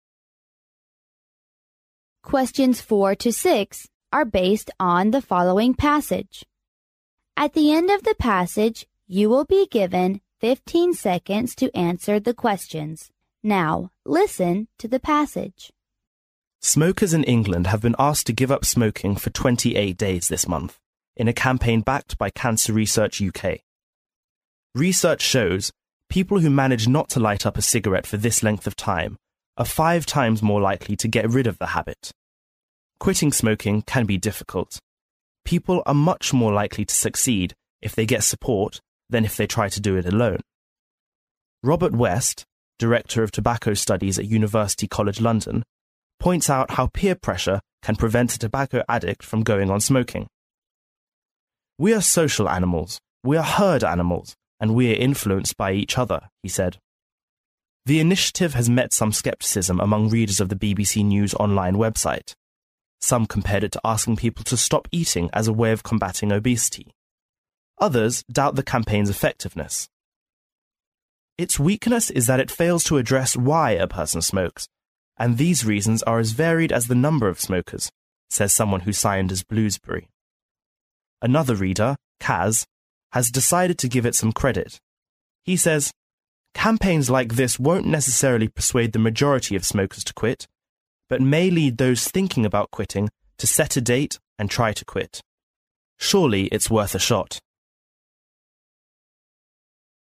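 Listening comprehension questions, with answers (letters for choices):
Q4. What does the campaign intend to tell people?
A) Smokers will quit smoking if they don't smoke on the 28th of this month.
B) Smokers will smoke again if they don't touch cigarette for 28 days.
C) Smokers can quit smoking if they refuse to smoke five times a day.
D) Smokers are more likely to quit smoking if they give up smoking for 28 days.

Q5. What can we learn from the passage?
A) The campaign is doomed to be a failure.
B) Giving up smoking for 28 days, one is sure to say goodbye to cigarette.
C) The campaign is a support for smokers to make up their mind to quit smoking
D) To quit smoking, one doesn't need support.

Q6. Why are some people not in favor of the campaign?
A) Because tobacco addicts can be easily influenced by each other.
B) Because giving up smoking is as easy as stopping eating to keep fit.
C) Because it's tolerable y for everyone has weakness.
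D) Because it neglects the reasons why people get into smoking.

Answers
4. D
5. C
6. D

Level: 英语四级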